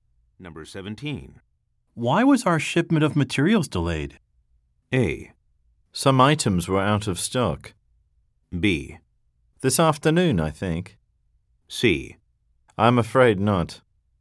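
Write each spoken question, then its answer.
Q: Why was our shipment of materials delayed?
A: A: Some items were out of stock.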